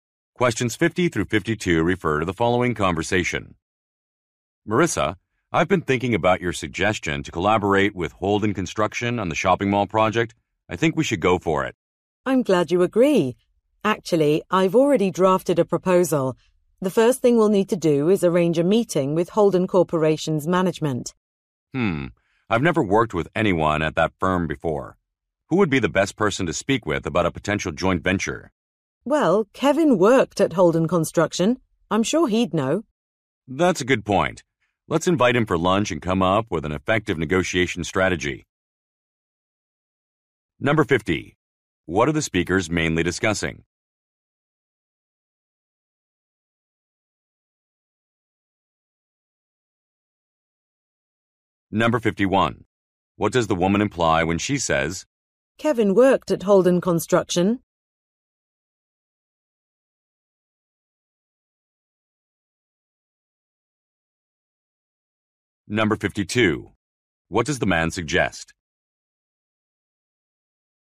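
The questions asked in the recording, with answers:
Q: What are the speakers mainly discussing?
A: Collaborating with Holden Construction on a shopping mall project

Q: What does the woman imply when she says,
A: Kevin would know whom to contact

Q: What does the man suggest?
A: Inviting Kevin to lunch to plan a negotiation strategy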